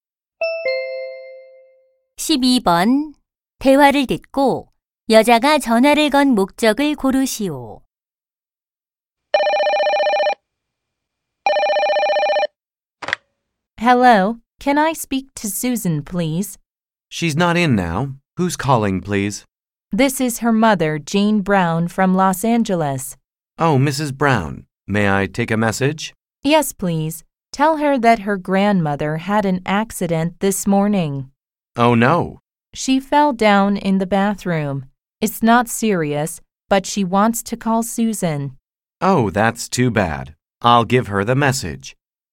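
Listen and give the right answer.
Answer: 할머니의 사고 소식을 Susan에게 전하려고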